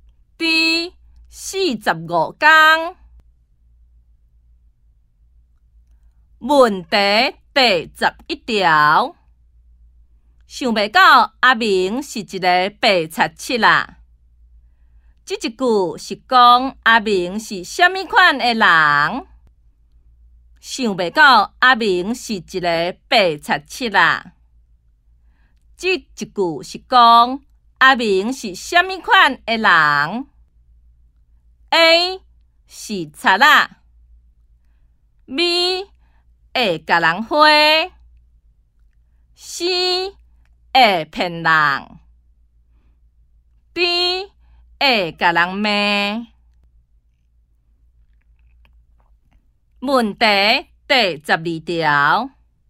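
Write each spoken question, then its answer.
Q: 这一句是讲阿明是虾米款的人?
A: C: 会骗人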